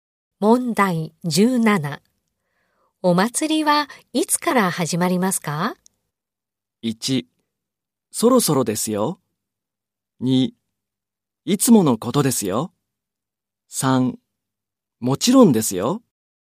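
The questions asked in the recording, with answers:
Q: お祭りはいつから始まりますか?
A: 1: そろそろですよ。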